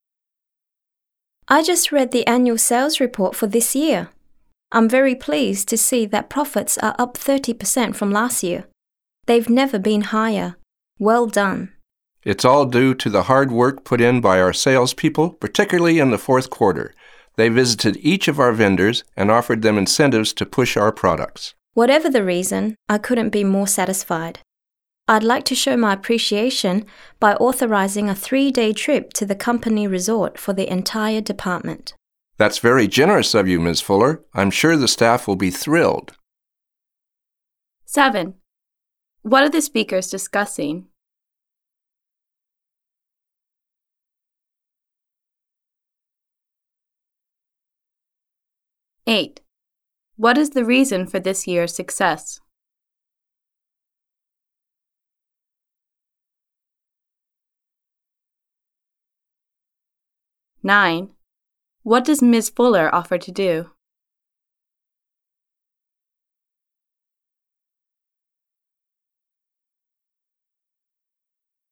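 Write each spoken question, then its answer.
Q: What are the speakers discussing?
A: The annual sales report (profits up 30%)

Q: What is the reason for this year's success?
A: The salespeople's hard work, offering vendors incentives

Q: What does Ms. Fuller offer to do?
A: Authorize a 3-day trip to the company resort for the department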